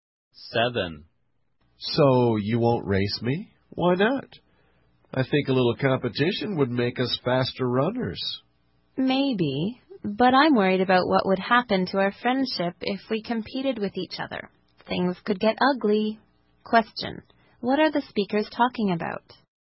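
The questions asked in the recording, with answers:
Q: What are the speakers talking about?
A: Whether racing each other would harm their friendship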